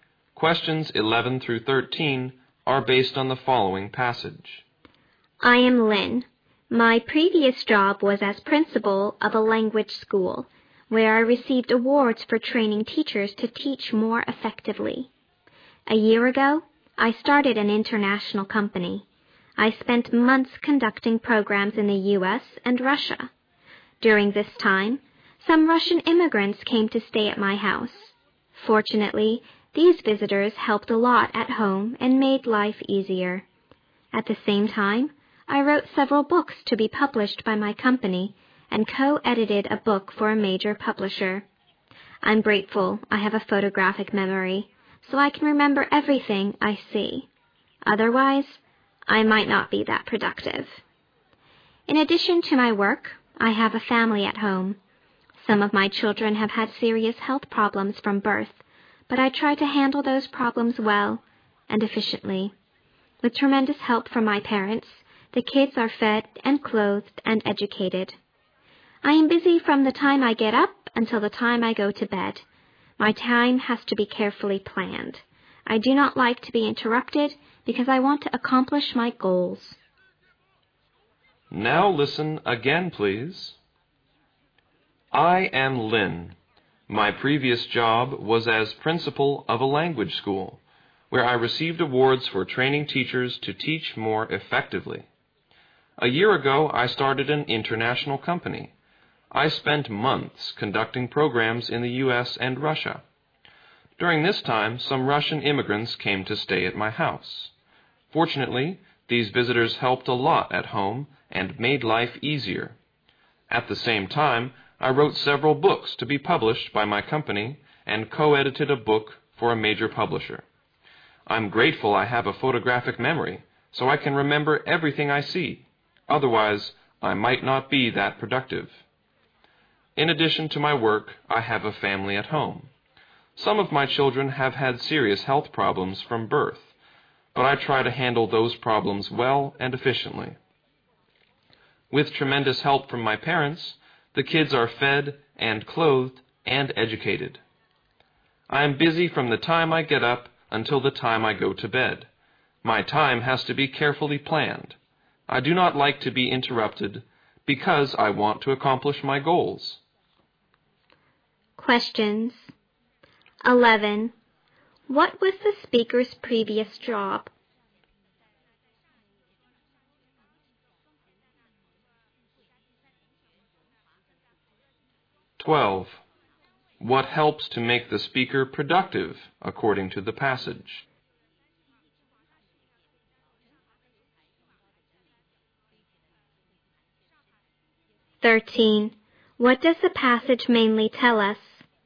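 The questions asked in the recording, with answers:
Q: What was the speaker's previous job?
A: Principal of a language school.

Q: What helps to make the speaker productive, according to the passage?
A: Her photographic memory.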